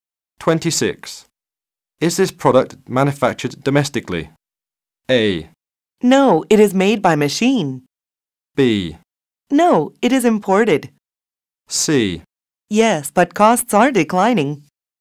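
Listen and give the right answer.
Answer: B: No, it is imported.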